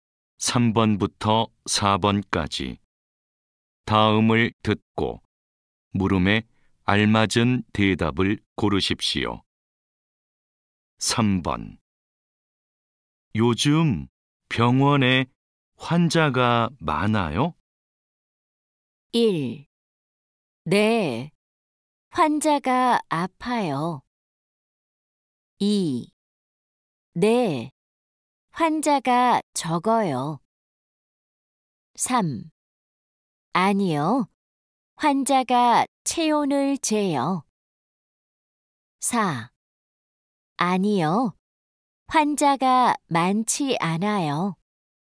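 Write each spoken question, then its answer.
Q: 요즘 병원에 환자가 많아요?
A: 4: 아니요, 환자가 많지 않아요.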